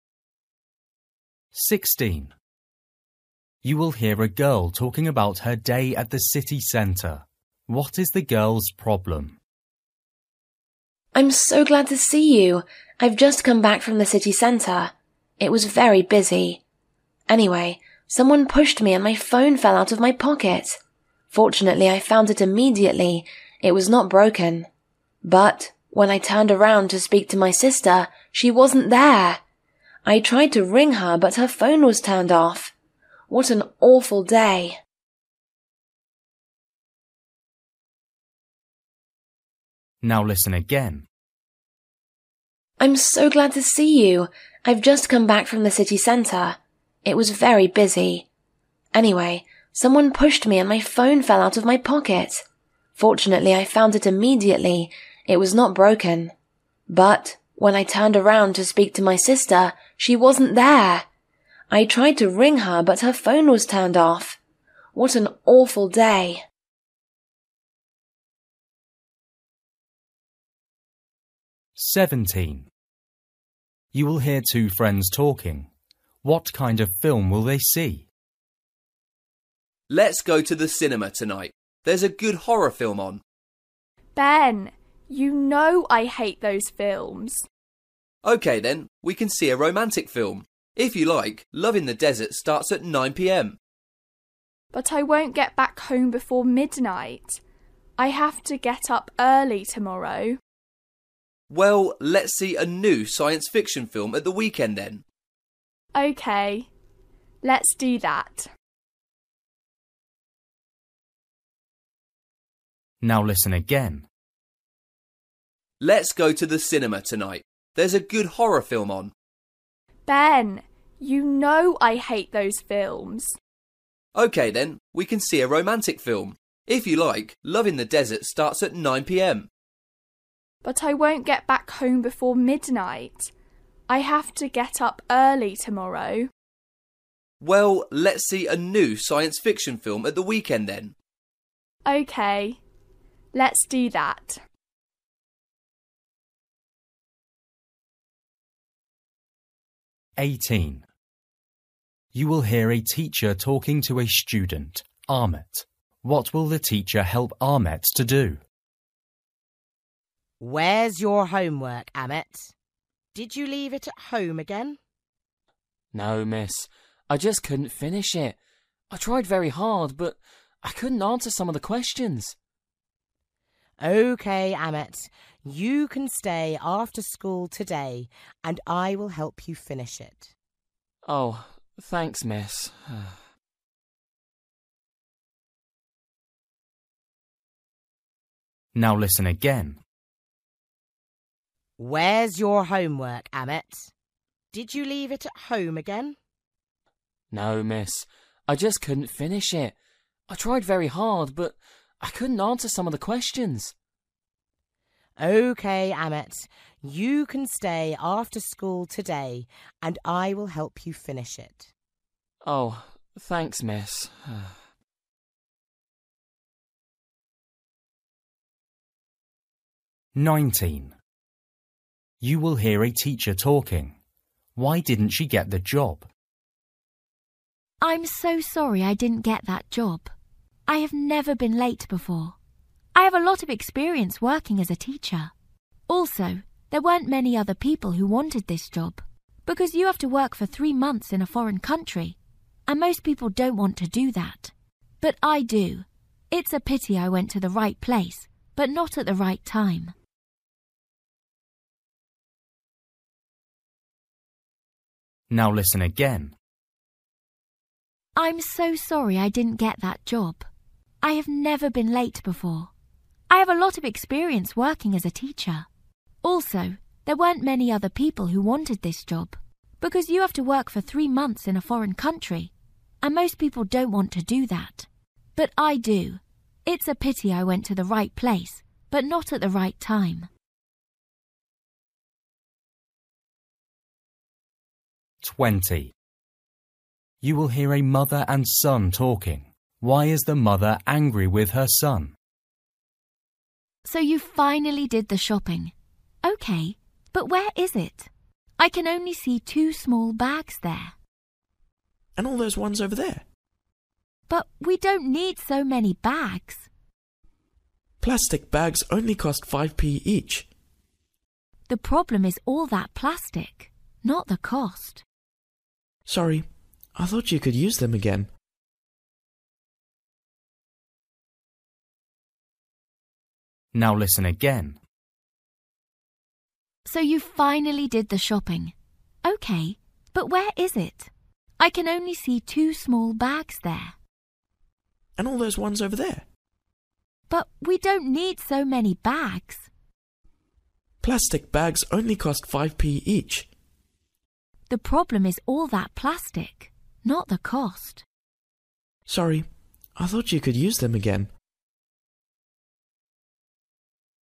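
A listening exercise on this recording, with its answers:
For each question, choose the correct answer.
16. You will hear a girl talking about her day at the city centre. What is the girl's problem?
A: She lost her sister in the crowd.

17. You will hear two friends talking. What kind of film will they see?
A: A science fiction film

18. You will hear a teacher talking to a student, Ahmet. What will the teacher help Ahmet to do?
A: Finish his homework

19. You will hear a teacher talking. Why didn't she get the job?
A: She was late.

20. You will hear a mother and a son talking. Why is the mother angry with her son?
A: He bought too many plastic bags.

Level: Luyện nghe trình độ A2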